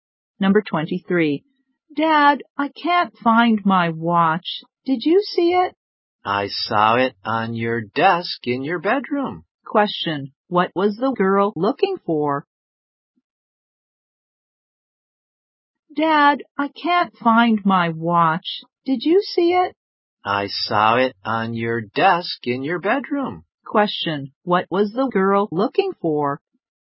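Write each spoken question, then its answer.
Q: Question. What was the girl looking for?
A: Her watch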